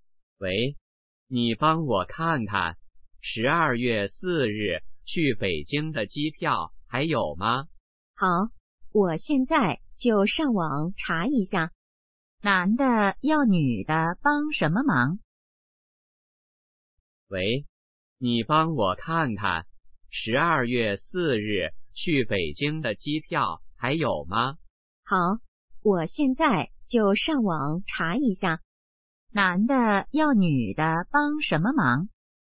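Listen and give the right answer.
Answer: 查机票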